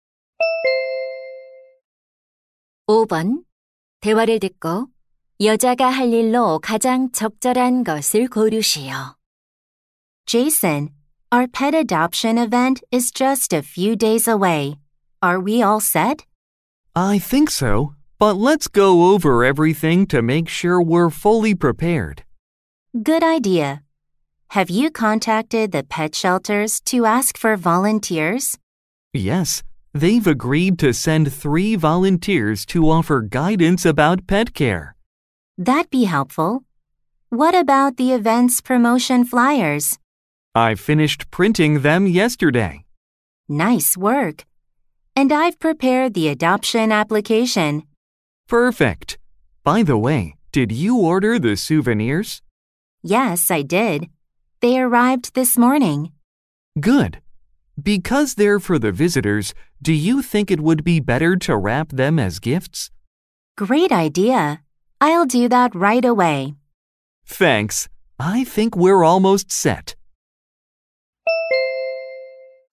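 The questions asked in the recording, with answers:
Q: 대화를 듣고 여자가 할 일로 가장 적절한 것을 고르시오.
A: 기념품 선물 포장하기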